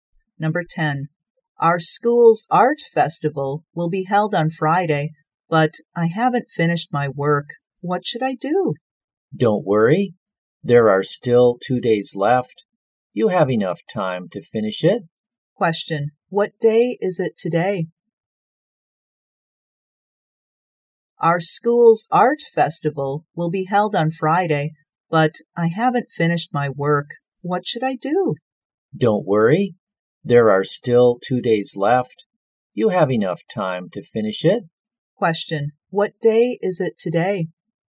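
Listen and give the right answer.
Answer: Wednesday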